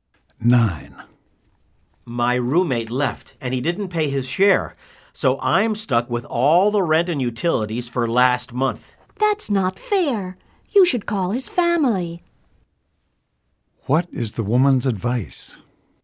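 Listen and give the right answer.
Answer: Call the roommate's family.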